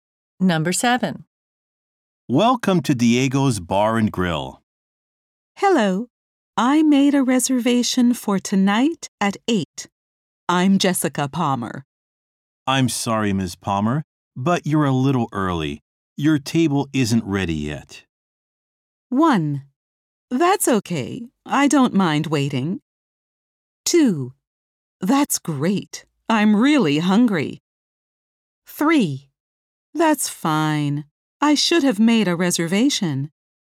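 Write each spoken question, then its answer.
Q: Your table isn't ready yet.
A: 1: That's okay. I don't mind waiting.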